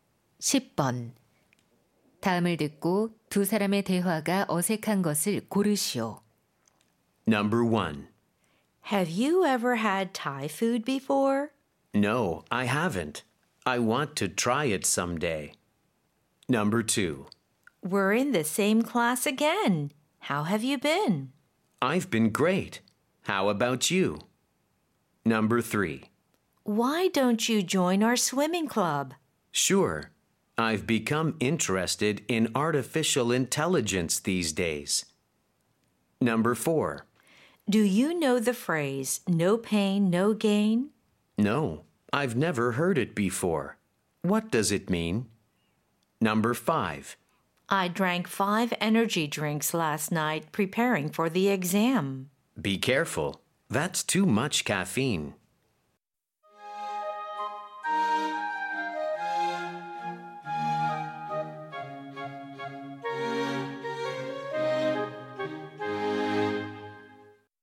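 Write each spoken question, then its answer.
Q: 다음을 듣고 두 사람의 대화가 어색한 것을 고르시오.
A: 3번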